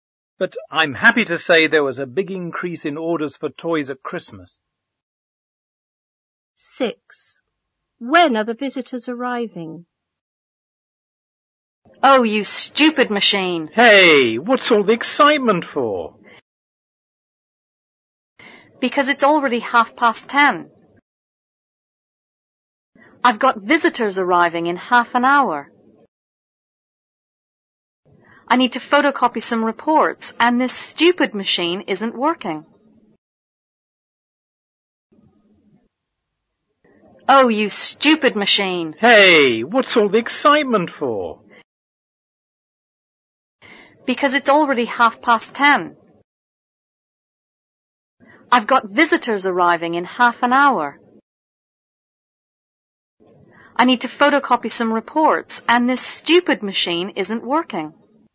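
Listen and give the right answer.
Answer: At 11:00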